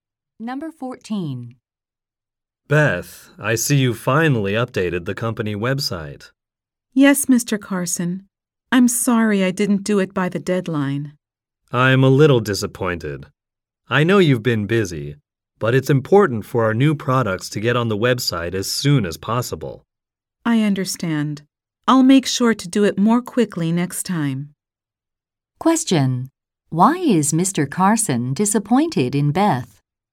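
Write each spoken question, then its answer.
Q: Why is Mr. Carson disappointed in Beth?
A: She didn't update the website by the deadline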